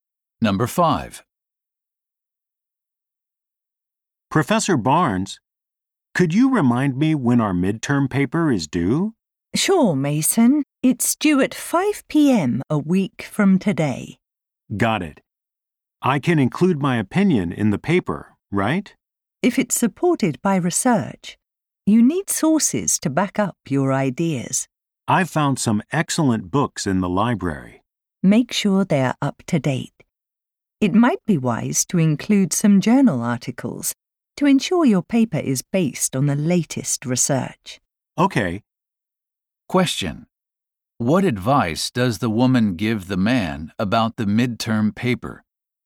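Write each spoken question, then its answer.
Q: What advice does the woman give the man about the midterm paper?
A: Use up-to-date sources, such as recent journal articles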